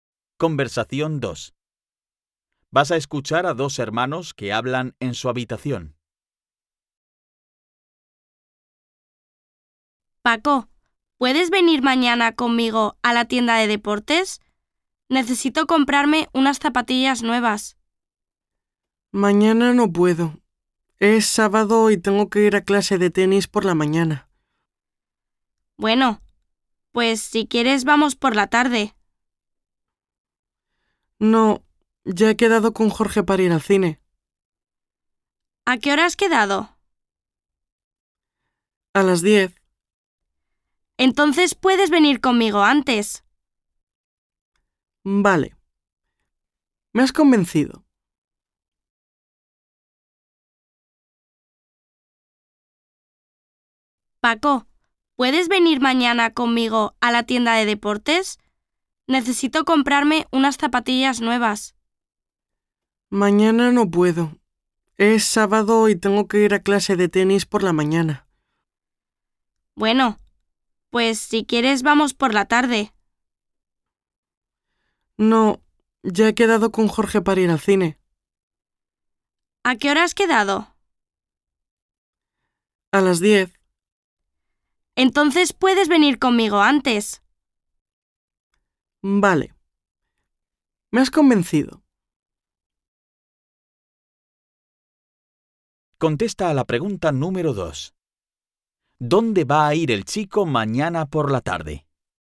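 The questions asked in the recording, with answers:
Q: ¿Dónde va a ir el chico mañana por la tarde?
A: Al cine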